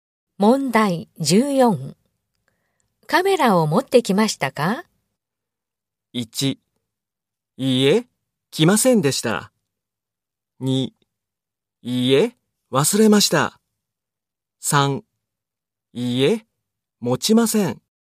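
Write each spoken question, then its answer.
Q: カメラを持ってきましたか?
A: 2: いいえ、忘れました。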